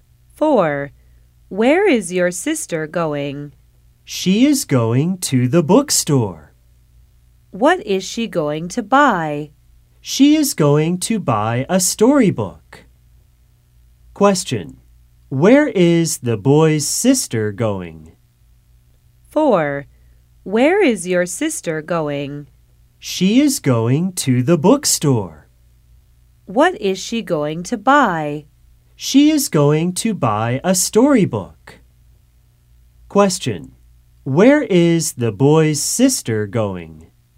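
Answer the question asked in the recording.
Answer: To the bookstore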